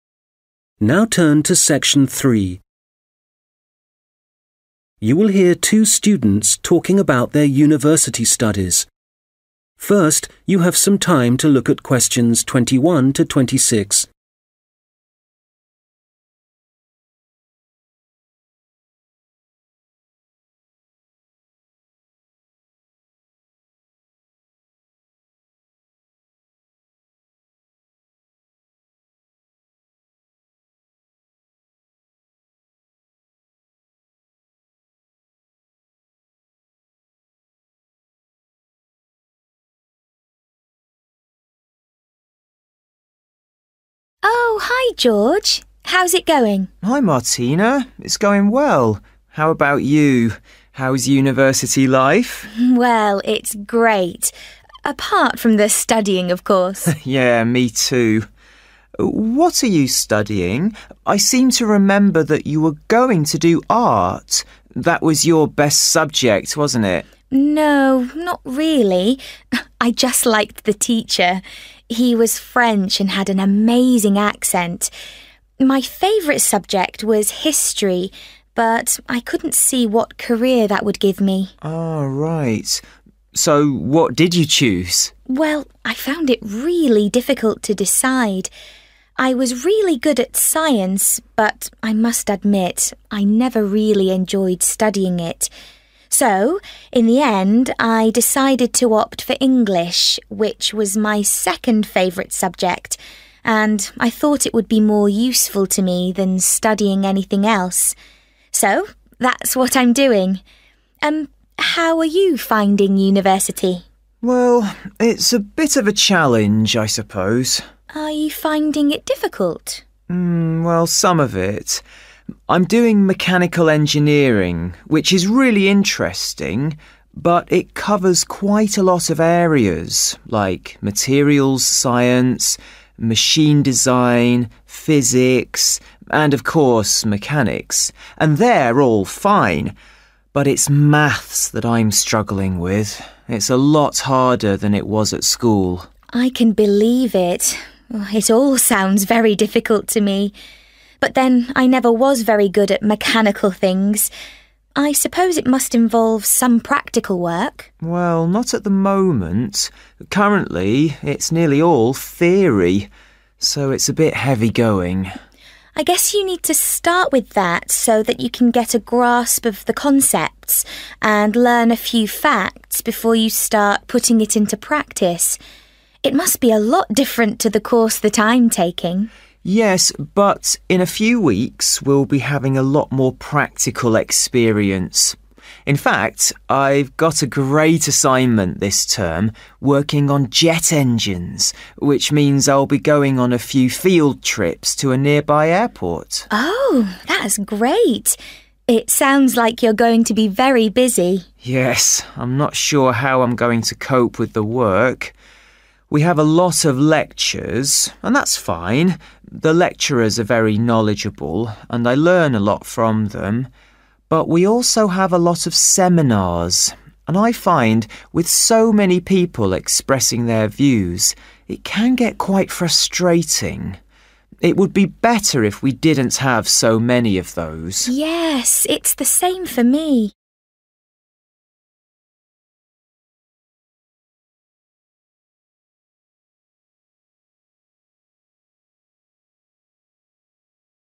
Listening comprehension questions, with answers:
Questions 23-26 Complete the summary below. Write NO MORE THAN TWO WORDS for each answer.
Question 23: He is finding 23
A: mathematics

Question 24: At the moment, his course is mainly 24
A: theory

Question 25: He will soon have an assignment which involves a study of 25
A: jet engines

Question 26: He thinks there are too many 26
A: seminars

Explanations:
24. Currently, it's nearly all (= mainly) theory [Hiện tại, gần như tất cả đều là lý thuyết]
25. I've got a great assignment this term working on (= involves a study of) jet engines [Tôi đã có một nhiệm vụ tuyệt vời trong học kỳ này đó là học về động cơ phản lực]
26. But we also have a lot of (= too many) seminars, and I find with so many people expressing their views, it can get quite frustrating. It would be better if we didn't have so many of those (= would like less of them) [Nhưng chúng tôi cũng có rất nhiều hội thảo, và tôi thấy việc rất nhiều người bày tỏ quan điểm có thể khiến bạn khá bực bội. Sẽ tốt hơn nếu chúng ta không có quá nhiều những thứ như thế].